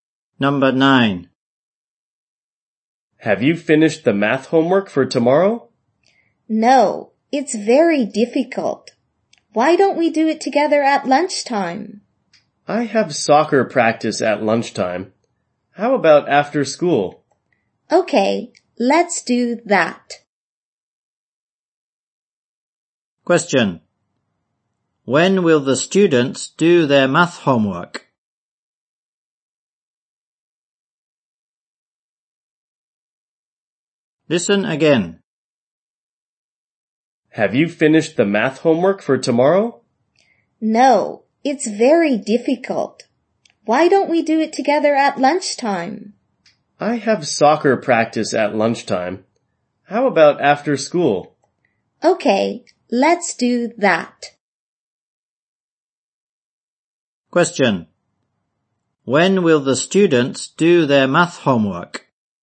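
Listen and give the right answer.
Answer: After school.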